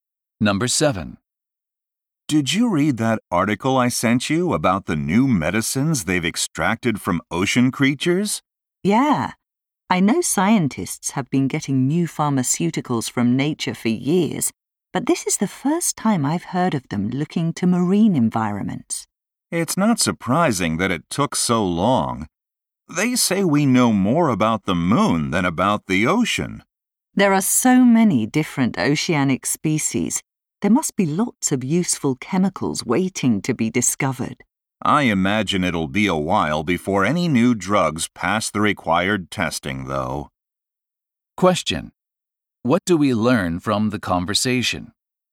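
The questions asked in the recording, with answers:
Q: What do we learn from the conversation?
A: Scientists are starting to get new medicines from ocean creatures, but new drugs will take time to pass testing.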